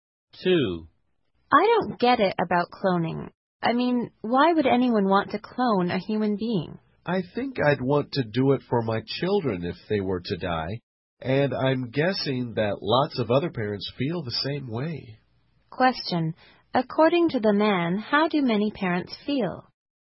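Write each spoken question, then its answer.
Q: according to the man, how do many parents feel?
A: They would want to clone their children if the children died.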